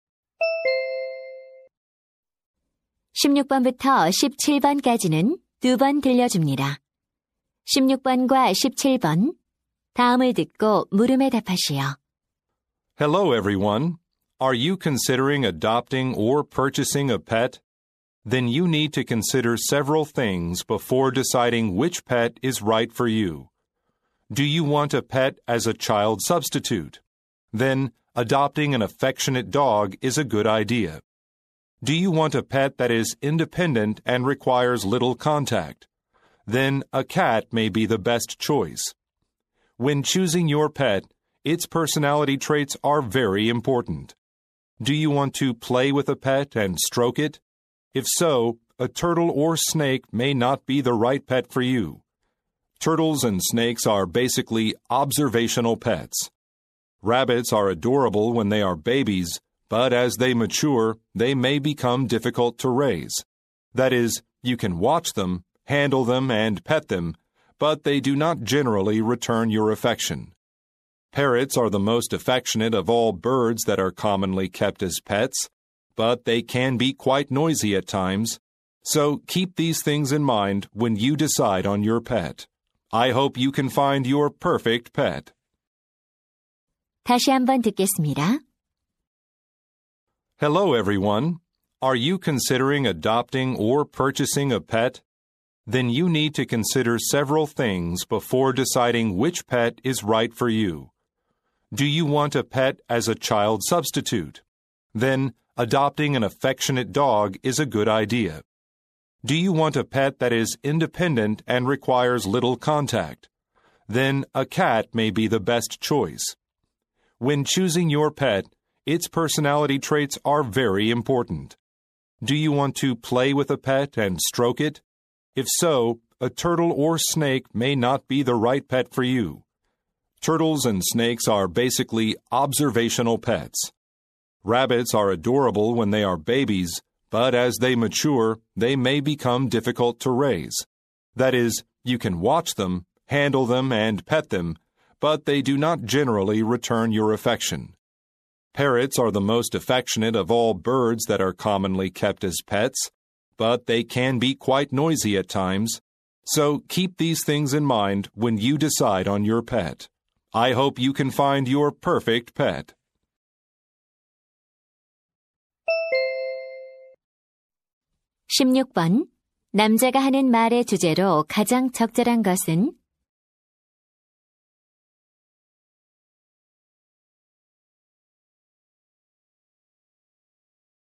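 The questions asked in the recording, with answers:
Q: 남자가 하는 말의 주제로 가장 적절한 것은?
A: 자신에게 맞는 애완동물을 고를 때 고려할 점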